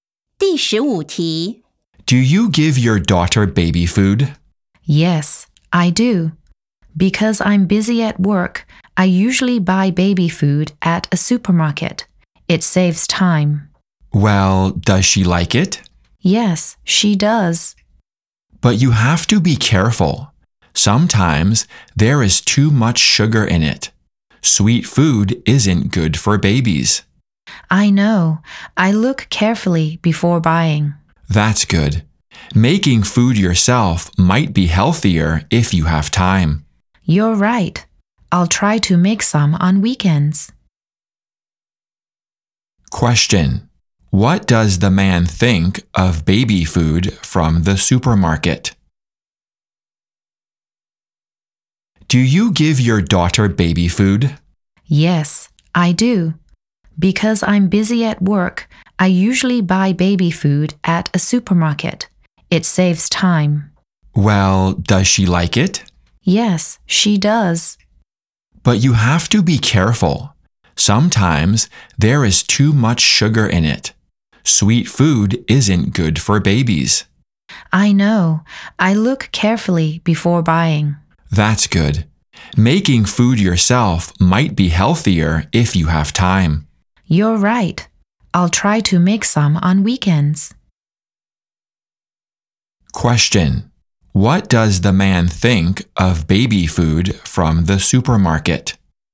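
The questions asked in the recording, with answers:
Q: What does the man think of baby food from the supermarket?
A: You have to be careful; it may have too much sugar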